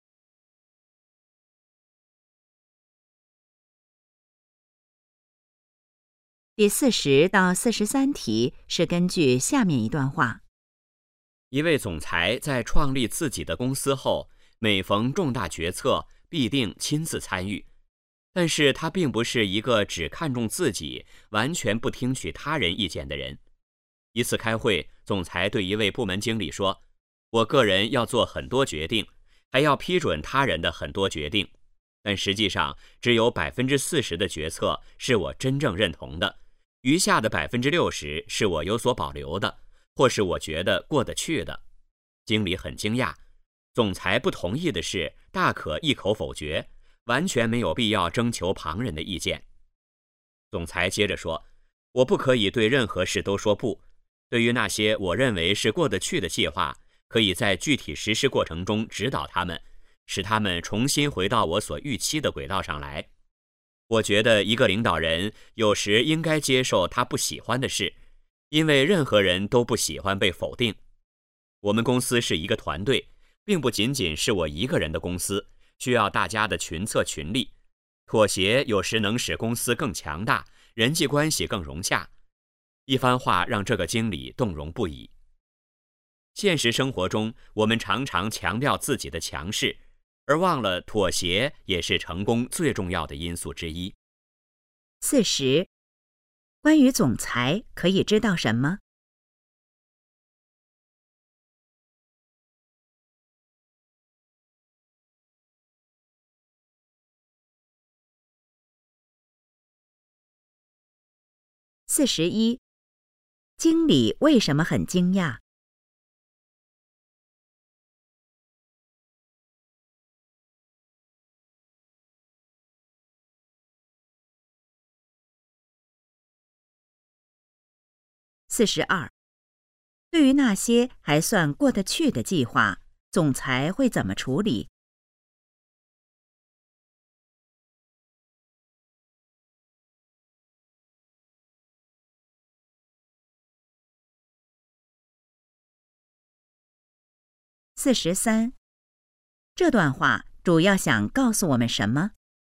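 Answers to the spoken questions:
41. 总裁不同意的事可以一口否决,没必要征求旁人意见
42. 在具体实施过程中指导他们
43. 妥协也是成功的重要因素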